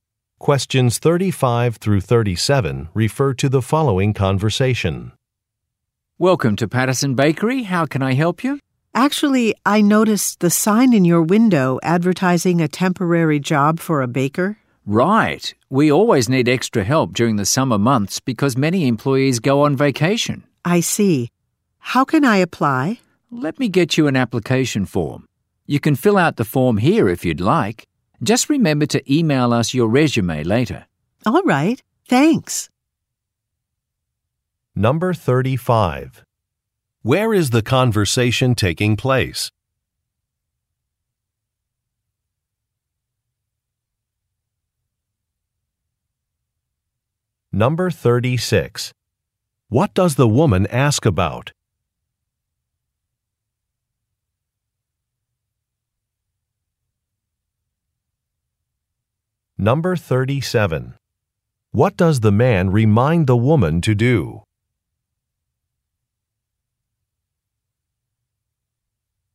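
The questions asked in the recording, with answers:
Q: Where is the conversation taking place?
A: At a bakery

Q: What does the woman ask about?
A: A temporary baker job

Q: What does the man remind the woman to do?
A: Email her resume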